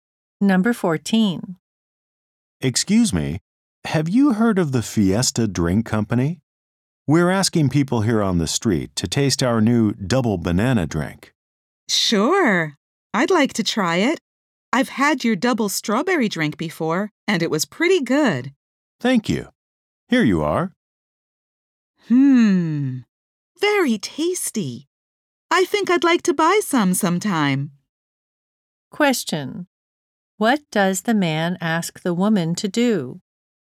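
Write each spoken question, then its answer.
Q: What does the man ask the woman to do?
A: Taste the new double banana drink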